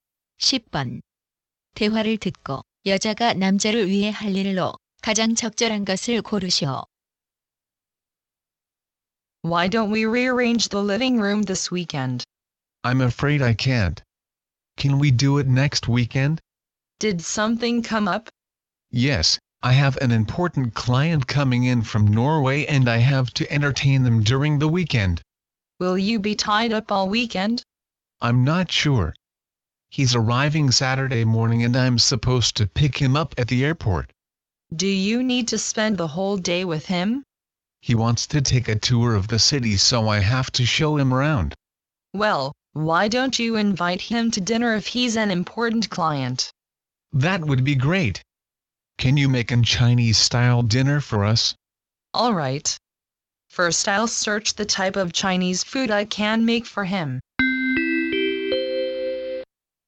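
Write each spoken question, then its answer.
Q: 대화를 듣고 여자가 남자를 위해 할 일로 가장 적절한 것을 고르시오.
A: 중국식 저녁 식사 준비하기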